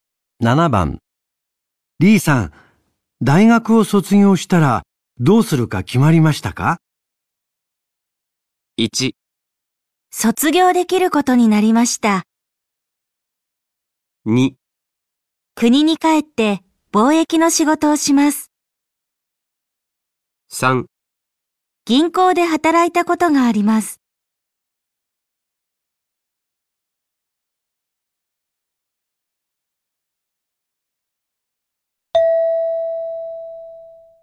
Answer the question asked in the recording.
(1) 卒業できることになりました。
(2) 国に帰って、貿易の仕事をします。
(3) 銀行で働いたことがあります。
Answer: (2) 国に帰って、貿易の仕事をします。

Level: N4 Listening · Test 1